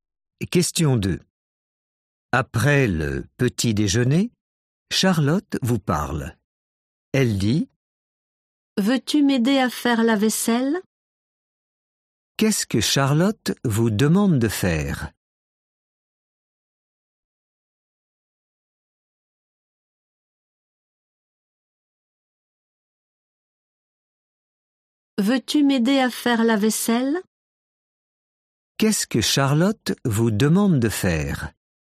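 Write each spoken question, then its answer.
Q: Qu'est-ce que Charlotte vous demande de faire ?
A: L'aider à faire la vaisselle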